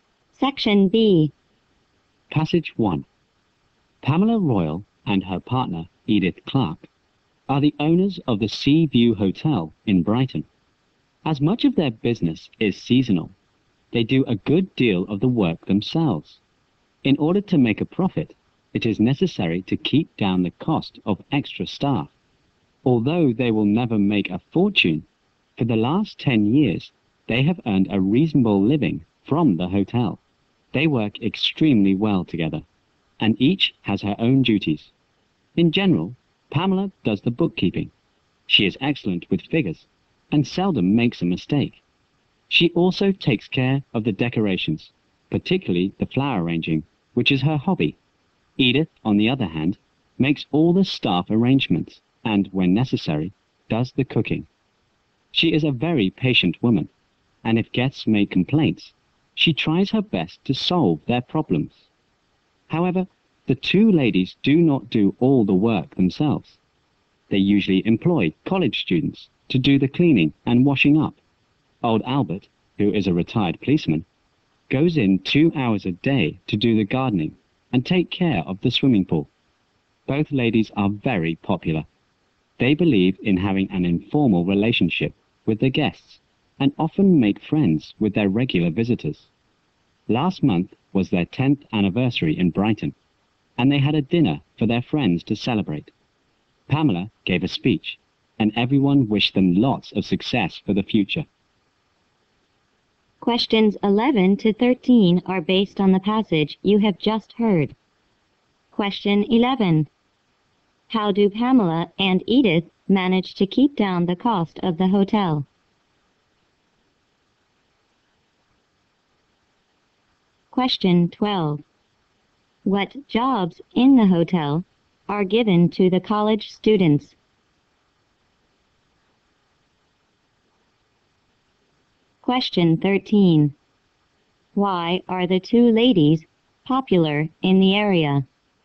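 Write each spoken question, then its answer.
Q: How do Pamela and Edith manage to keep down the cost of the hotel?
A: By doing much of the work themselves

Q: What jobs in the hotel are given to the college students?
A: Cleaning and washing up

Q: Why are the two ladies popular in the area?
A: They have an informal relationship with guests and make friends with them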